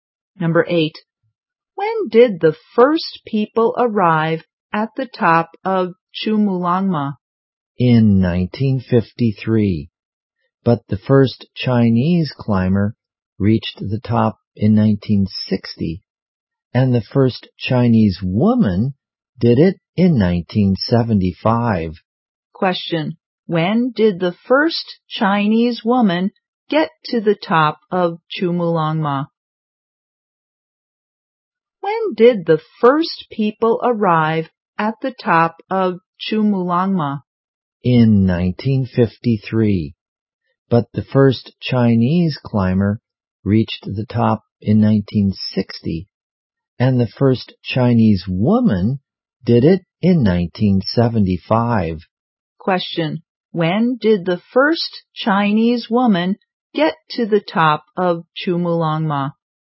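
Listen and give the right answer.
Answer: In 1975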